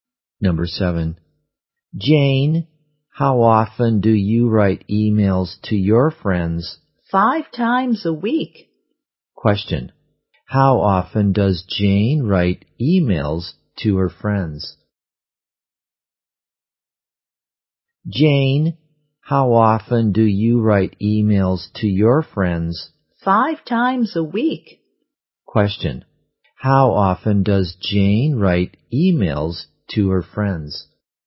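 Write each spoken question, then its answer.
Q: How often does Jane write emails to her friends?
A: 5 times a week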